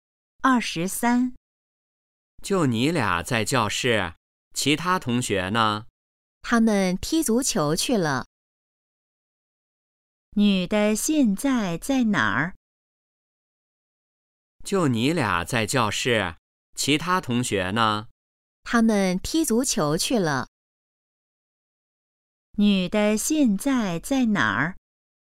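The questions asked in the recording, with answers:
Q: 女的现在在哪儿?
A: 教室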